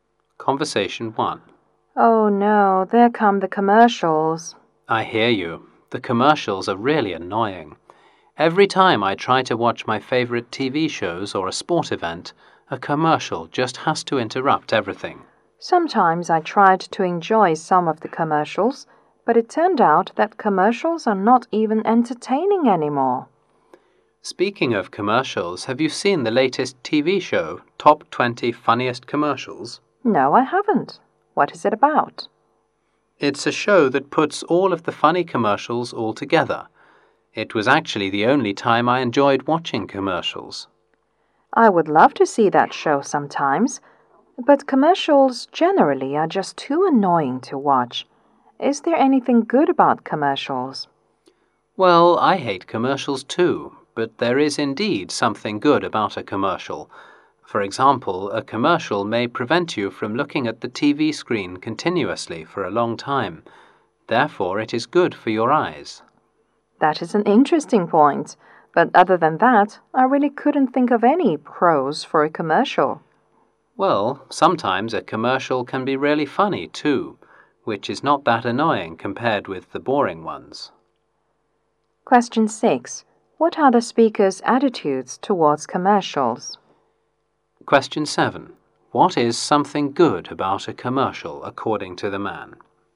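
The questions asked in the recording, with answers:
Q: What are the speaker's attitudes towards commercials?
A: They find commercials annoying

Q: What is something good about a commercial, according to the man?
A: It stops you staring at the TV screen too long, which is good for your eyes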